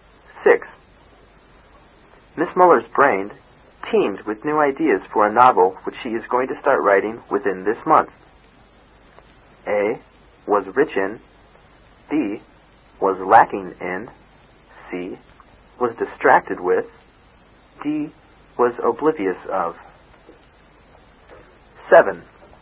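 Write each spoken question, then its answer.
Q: Miss Muller's brain teemed with new ideas for a novel which she is going to start writing within this month.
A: A: Was rich in.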